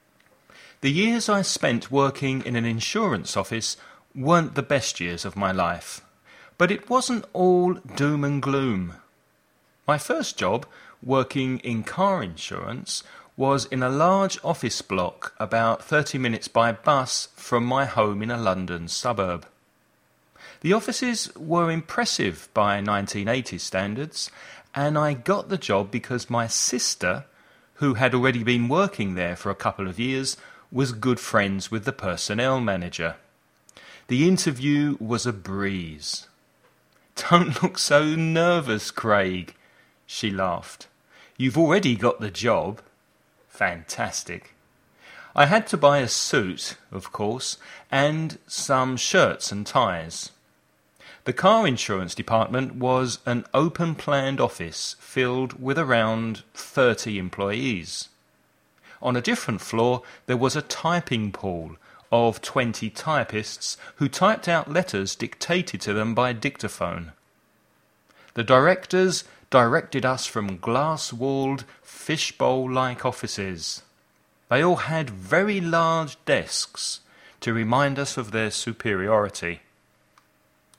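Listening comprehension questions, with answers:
Listen and write the questions you hear.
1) Which kind of insurance did the speaker work in?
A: Car insurance

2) How did he travel to work?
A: By bus

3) Which two people helped him get the job?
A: His sister and the personnel manager

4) What three things did he need to buy?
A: A suit, shirts and ties

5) What did the company directors have to remind the employees of their superiority?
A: Very large desks

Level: nivel avanzado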